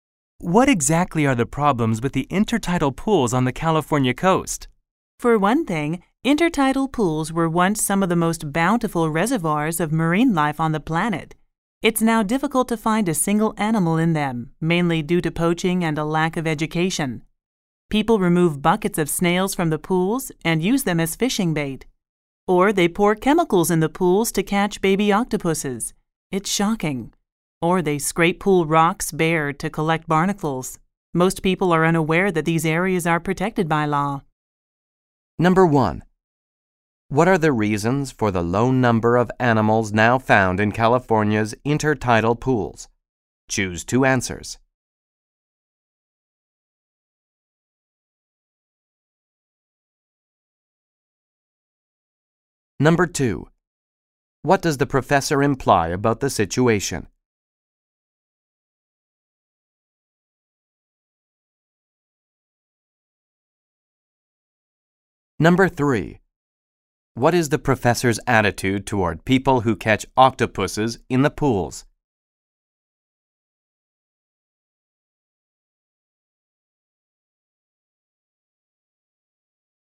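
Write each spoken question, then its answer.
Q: What are the reasons for the low number of animals now found in California's intertidal pools?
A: Poaching and a lack of education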